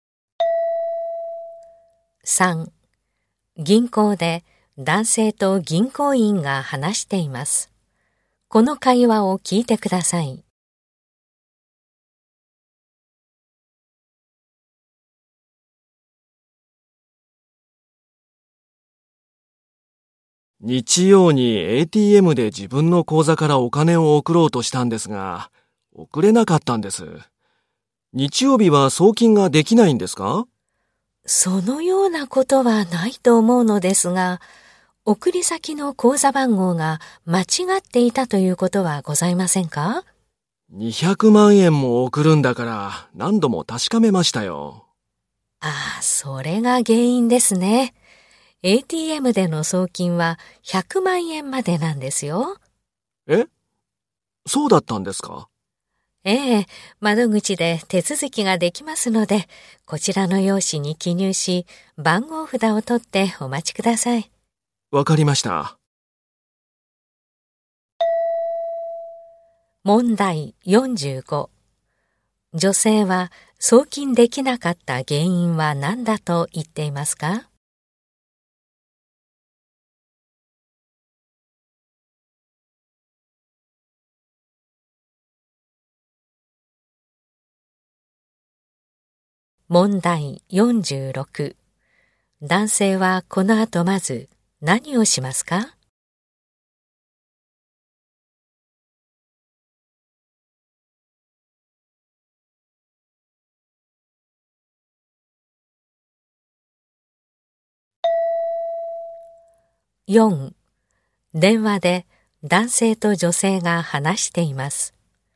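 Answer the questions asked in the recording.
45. ATMでの送金は100万円までなのに200万円送ろうとしたから
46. 窓口の用紙に記入する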